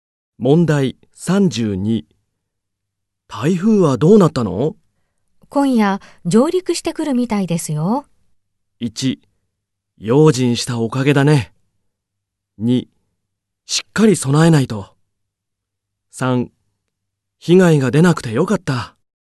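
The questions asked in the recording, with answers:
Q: 台風はどうなったの?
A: 2: しっかり備えないと。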